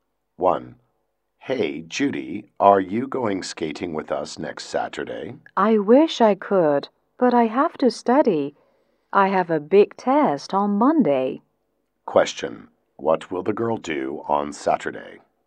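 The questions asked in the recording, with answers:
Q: What will the girl do on Saturday?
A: Study for a test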